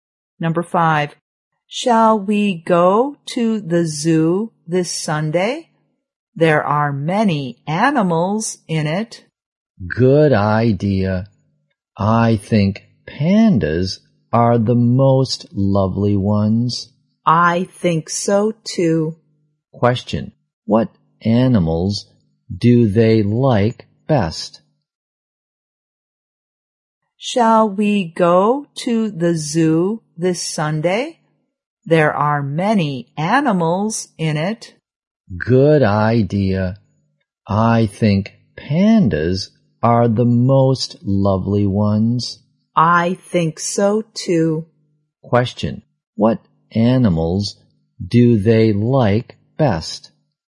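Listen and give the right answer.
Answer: Pandas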